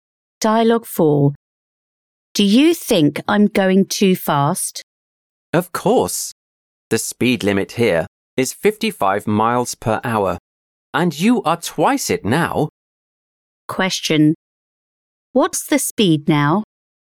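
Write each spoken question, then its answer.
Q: What's the speed now?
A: 110 miles per hour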